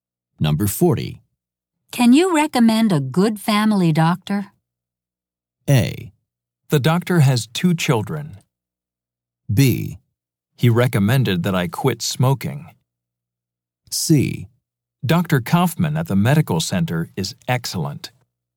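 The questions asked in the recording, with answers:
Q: Can you recommend a good family doctor?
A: C: Dr. Kaufman at the medical center is excellent.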